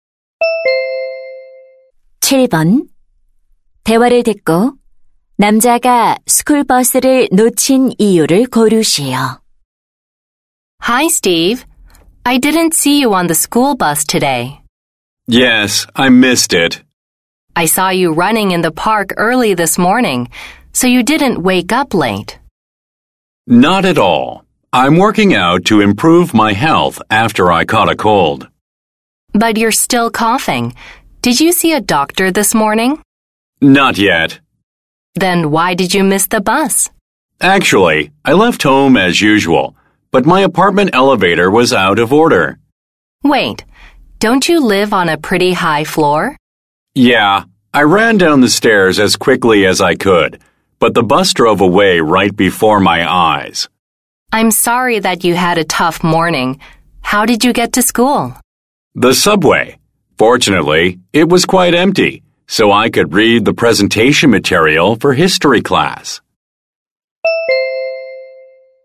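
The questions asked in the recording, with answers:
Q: 대화를 듣고 남자가 스쿨버스를 놓친 이유를 고르시오.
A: 아파트 엘리베이터가 고장 나서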